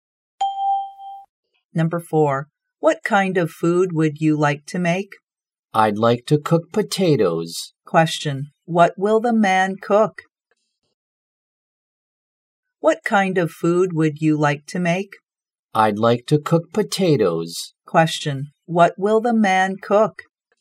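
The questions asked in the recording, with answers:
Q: what will the man cook?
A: Potatoes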